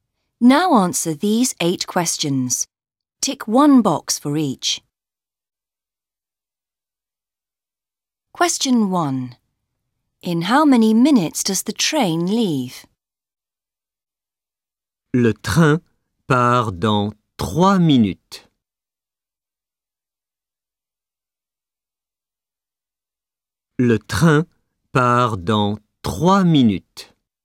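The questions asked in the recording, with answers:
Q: In how many minutes does the train leave?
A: 3 minutes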